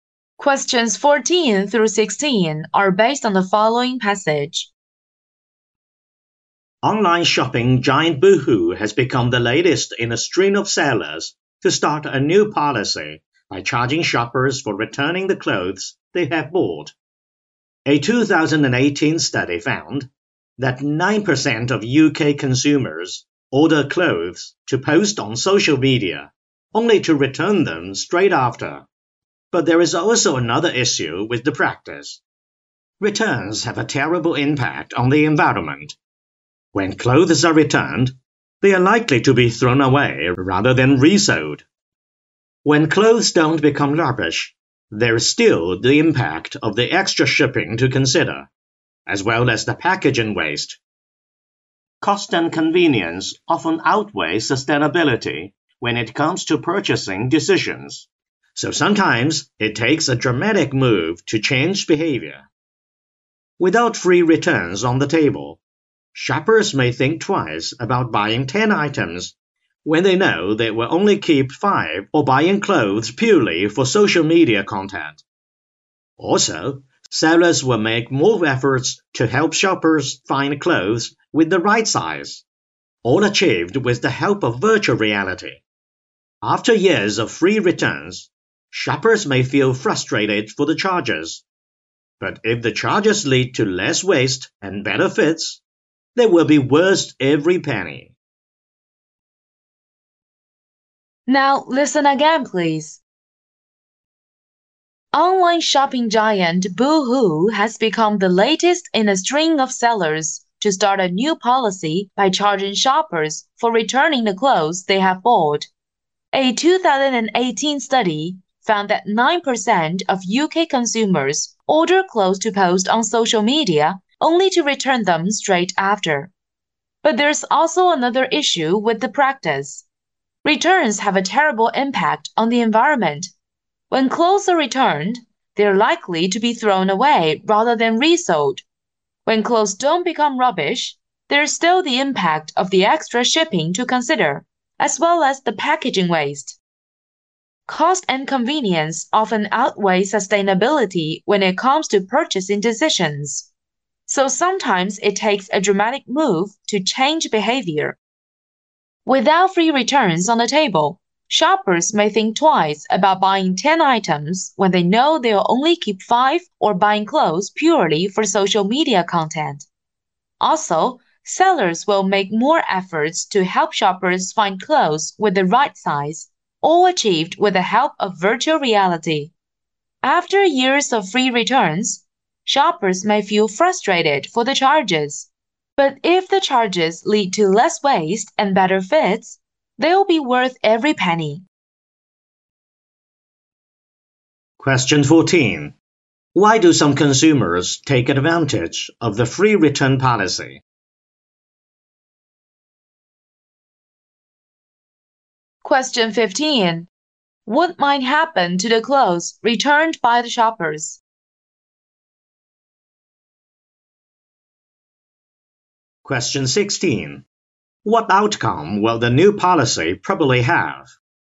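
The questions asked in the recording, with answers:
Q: Why do some consumers take advantage of the free return policy?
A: To post the clothes on social media

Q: What might happen to the clothes returned by the shoppers?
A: They are likely to be thrown away

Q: What outcome will the new policy probably have?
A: Less waste and better fits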